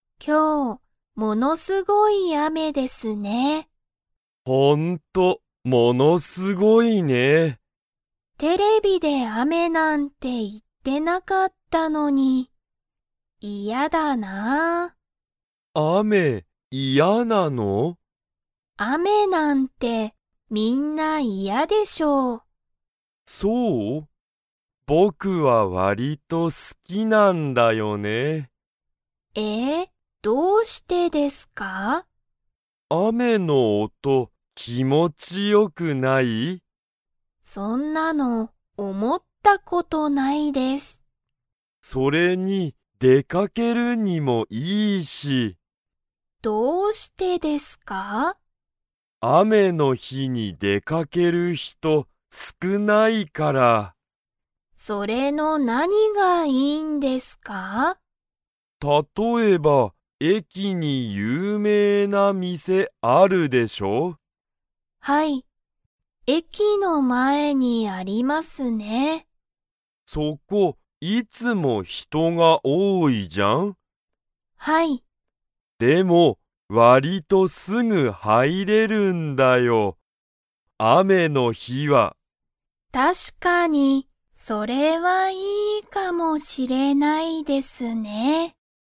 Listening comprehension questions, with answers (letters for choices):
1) ゆうとは雨あめがわりと だ。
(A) 好すき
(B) 嫌いや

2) 駅えきに何なにがありますか?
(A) 雨あめ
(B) 自転車じてんしゃ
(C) 会社かいしゃ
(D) 有名ゆうめいな店みせ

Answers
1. A
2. D

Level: Level 3